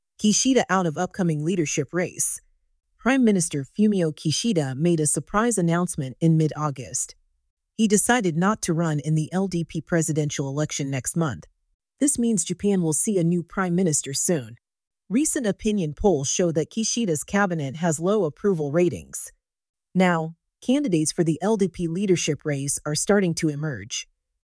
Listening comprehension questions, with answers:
英語ニュースの音声を聞き、各空欄に入る英文を正確に書き取ってください。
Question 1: Prime Minister Fumio Kishida ( ) mid-August.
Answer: made a surprise announcement in

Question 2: He decided not to run ( ).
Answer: in the LDP presidential election next month

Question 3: This means ( ).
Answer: Japan will see a new prime minister soon

「誰が(Who)」「何をしたのか(What)」「なぜ(Why)」の答えを探しながら聞きましょう。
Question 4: 誰が(Who)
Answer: 岸田文雄首相が

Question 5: 何をしたのか(What)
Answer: 来月の自民党総裁選に出馬しないことを決めた。

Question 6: なぜ(Why)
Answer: 最近の世論調査は、岸田内閣の支持率が低いことを示している。

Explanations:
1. ⇒「surprising(驚くべき)」は文法的・意味的に正しい表現ですが、「surprise」とは音が違うことに注意しましょう。 surprised(驚いた)」は「驚いた発表」となり、「発表が驚く」という不自然な意味になります。
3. ⇒ 「a」が使われる理由は、「new prime minister(次期首相)」がまだ特定されていないからです。 「a」は不特定のものに、「the」は既に特定されているものに使います。次の首相がまだ決まっていないため、「a」が適切です。

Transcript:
Kishida Out of Upcoming Leadership Race
Prime Minister Fumio Kishida made a surprise announcement in mid-August.
He decided not to run in the LDP presidential election next month.
This means Japan will see a new prime minister soon.
Recent opinion polls show that Kishida's Cabinet has low approval ratings.
Now, candidates for the LDP leadership race are starting to emerge.